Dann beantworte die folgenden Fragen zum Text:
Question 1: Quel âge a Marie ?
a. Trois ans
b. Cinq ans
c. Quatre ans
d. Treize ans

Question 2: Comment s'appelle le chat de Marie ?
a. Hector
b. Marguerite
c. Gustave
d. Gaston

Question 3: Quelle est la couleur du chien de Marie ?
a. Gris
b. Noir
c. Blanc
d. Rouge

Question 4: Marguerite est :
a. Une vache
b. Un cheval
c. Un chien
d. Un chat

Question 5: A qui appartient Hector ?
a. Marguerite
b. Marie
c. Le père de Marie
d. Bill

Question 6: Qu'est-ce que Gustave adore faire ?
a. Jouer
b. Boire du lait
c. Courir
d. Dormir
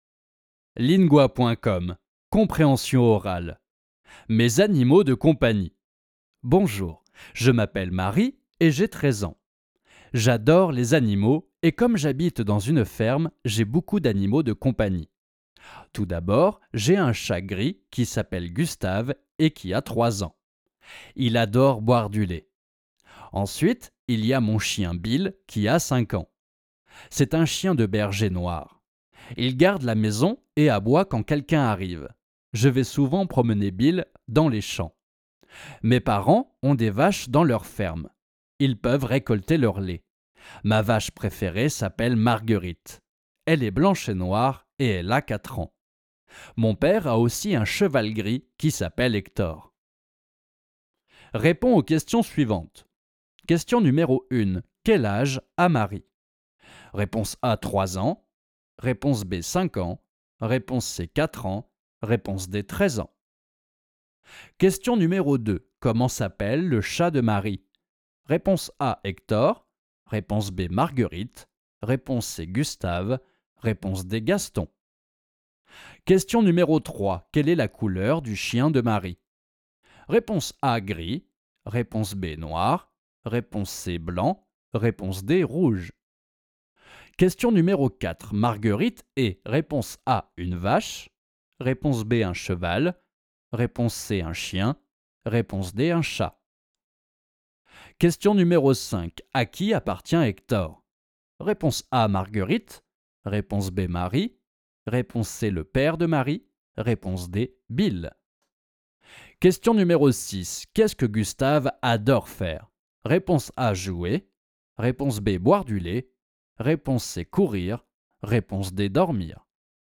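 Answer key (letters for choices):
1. d
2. c
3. b
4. a
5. c
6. b

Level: Basis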